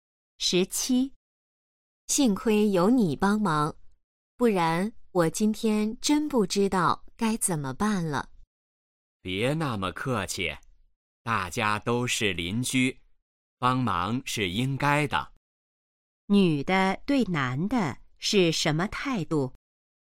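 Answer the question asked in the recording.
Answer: 感激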